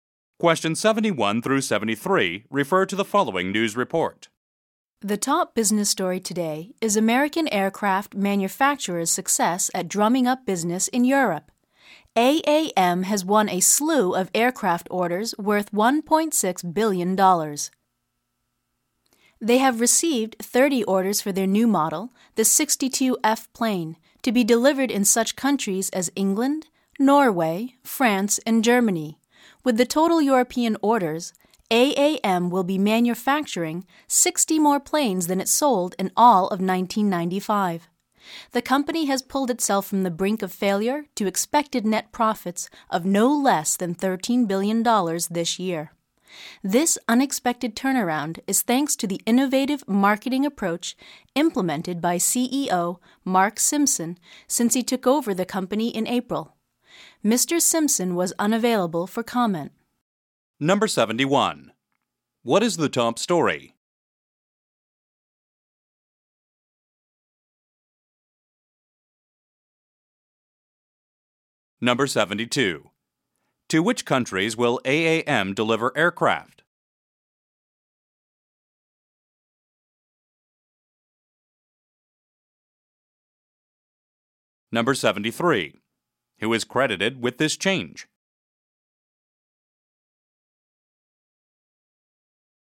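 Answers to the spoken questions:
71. AAM's success in winning aircraft orders in Europe
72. England, Norway, France and Germany
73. CEO Mark Simpson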